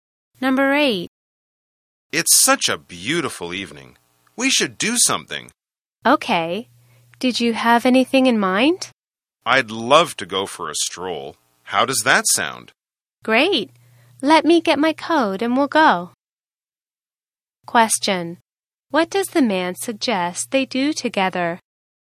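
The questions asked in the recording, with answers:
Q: What does the man suggest they do together?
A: Go for a stroll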